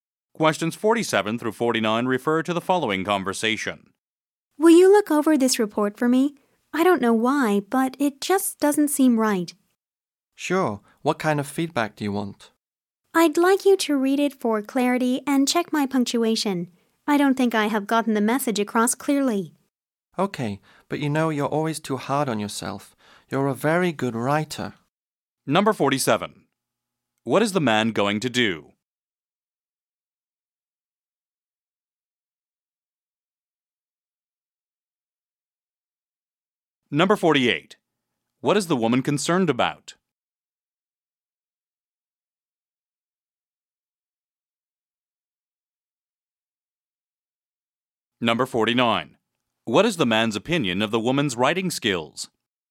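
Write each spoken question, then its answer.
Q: What is the man going to do?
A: Read over the woman's report

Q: What is the woman concerned about?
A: That her report isn't clear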